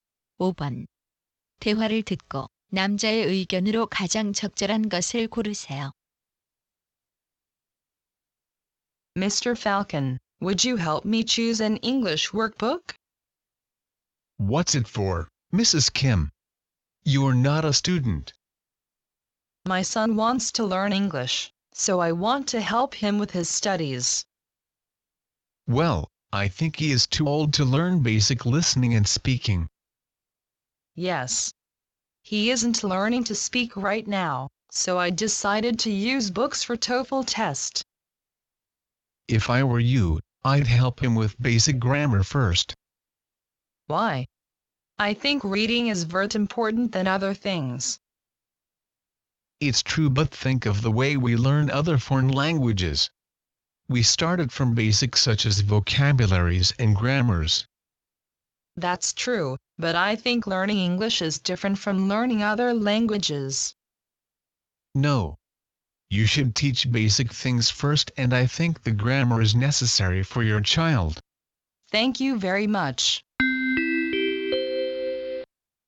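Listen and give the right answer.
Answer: 영어는 문법 같은 기초부터 가르쳐야 한다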